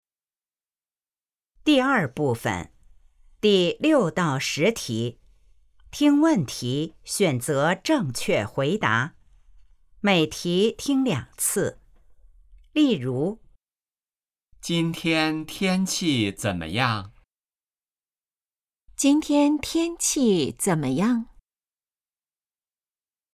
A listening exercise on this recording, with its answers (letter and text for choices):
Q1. 今天天气怎么样?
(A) 在学习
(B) 很好听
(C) 非常热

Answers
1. (C) 非常热

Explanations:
The three written options appear on your paper before the audio plays — read them first so you know what to listen for.

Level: HSK 1